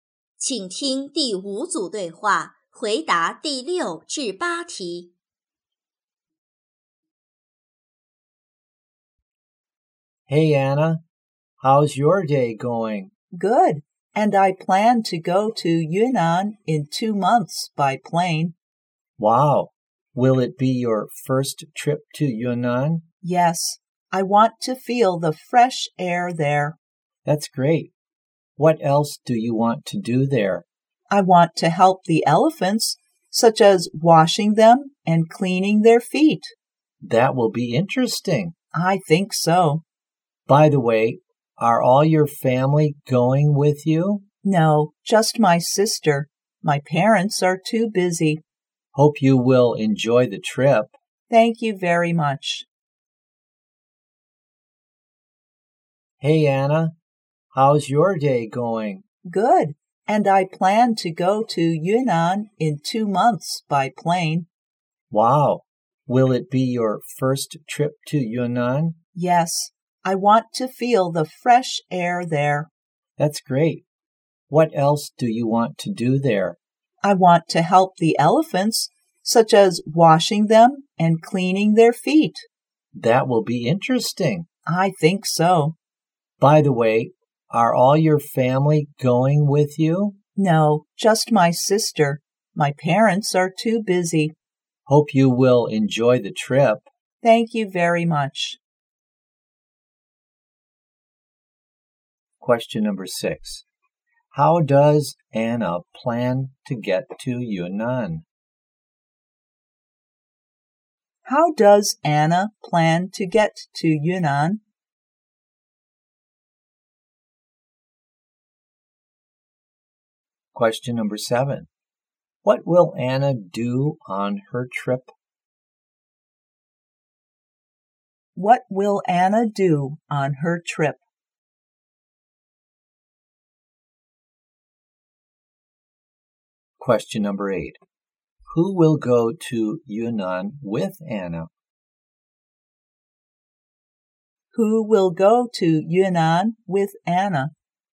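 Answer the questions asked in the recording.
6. By plane
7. Help the elephants
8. Her sister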